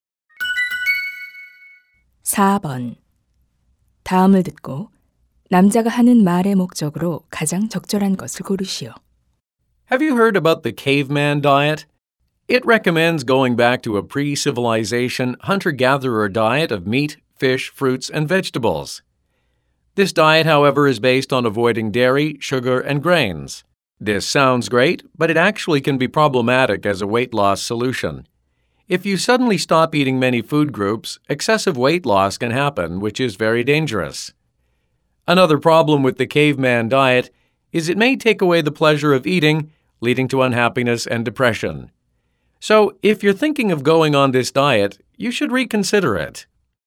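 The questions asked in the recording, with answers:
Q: 다음을 듣고 남자가 하는 말의 목적으로 가장 적절한 것을 고르시오.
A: 원시인 다이어트의 위험성을 경고하려고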